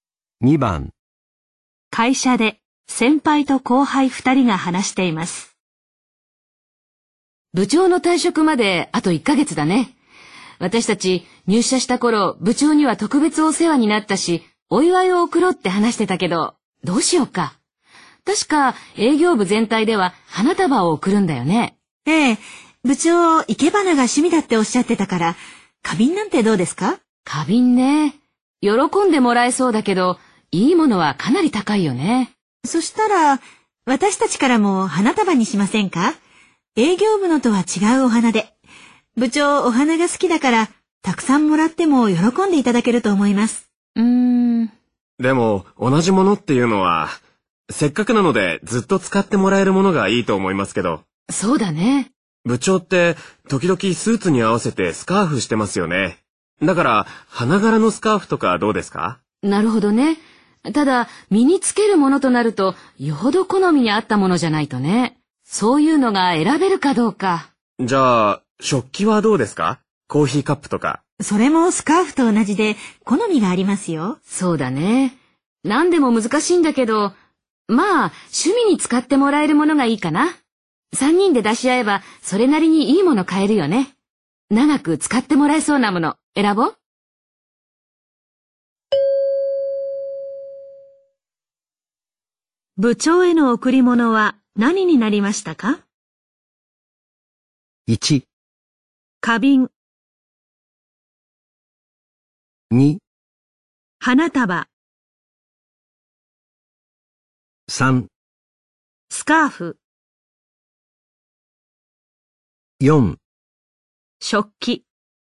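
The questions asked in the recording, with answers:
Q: 部長への贈り物は何になりましたか?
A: 1: 花瓶。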